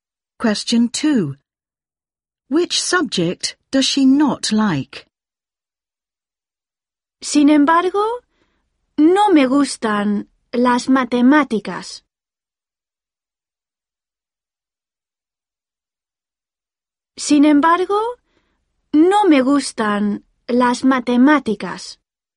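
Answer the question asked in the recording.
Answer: Maths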